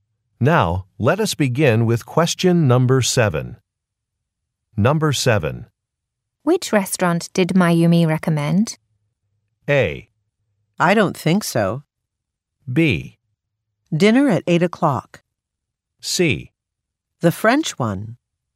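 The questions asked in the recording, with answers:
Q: Which restaurant did Mayumi recommend?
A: C: The French one.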